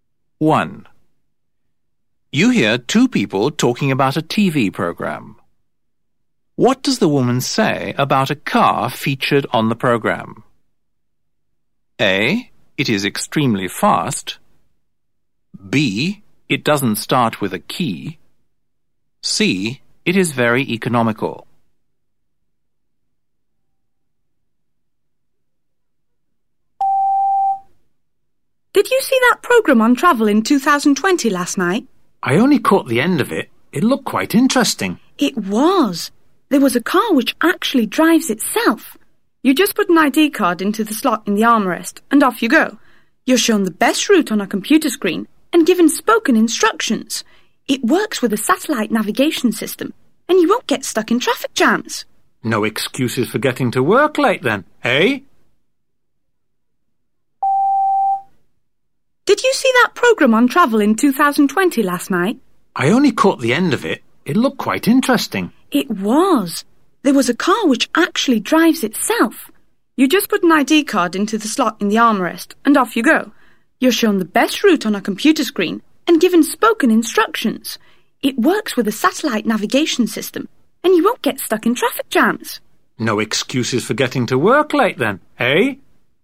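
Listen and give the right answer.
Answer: B: It doesn't start with a key.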